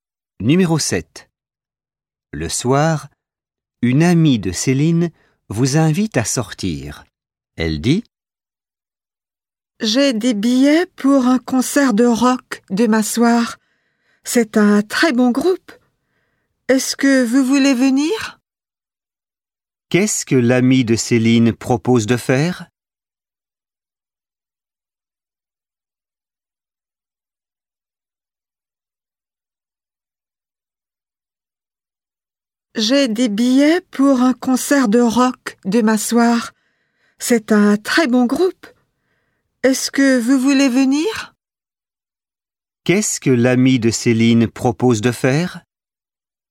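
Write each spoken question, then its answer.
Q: Qu'est-ce que l'ami de Céline propose de faire?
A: Aller à un concert de rock demain soir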